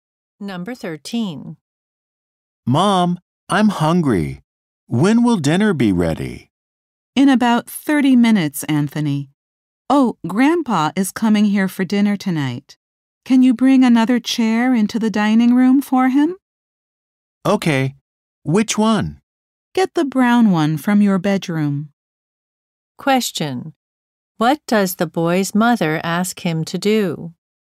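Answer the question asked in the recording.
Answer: Bring the brown chair from his bedroom into the dining room.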